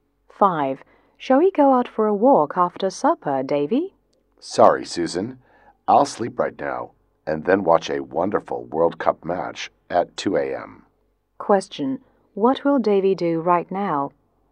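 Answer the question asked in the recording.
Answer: Sleep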